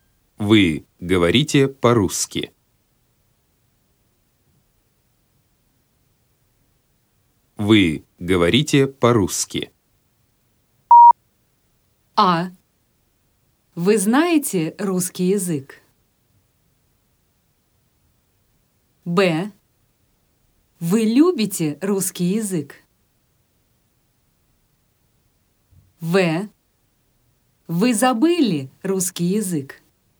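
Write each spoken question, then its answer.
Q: Вы говорите по-русски.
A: А: Вы знаете русский язык?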